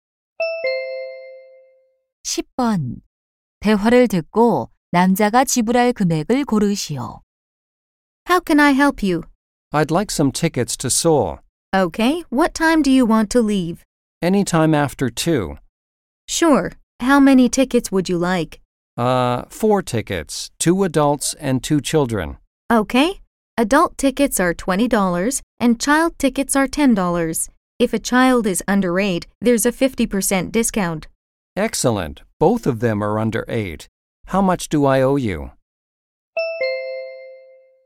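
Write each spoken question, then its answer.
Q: 대화를 듣고 남자가 지불할 금액을 고르시오.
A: $50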